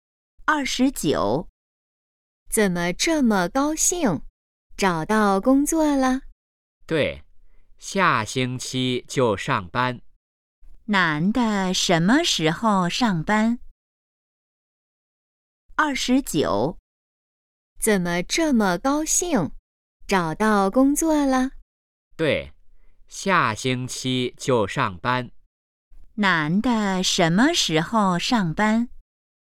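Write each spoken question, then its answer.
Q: 男的什么时候上班?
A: 下星期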